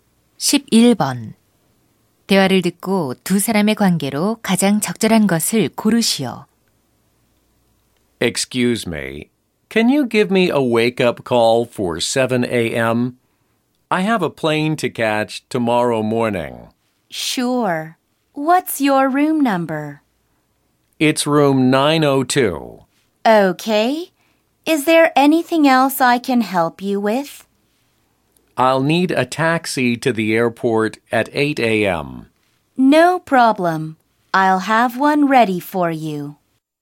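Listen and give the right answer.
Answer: 호텔 직원과 투숙객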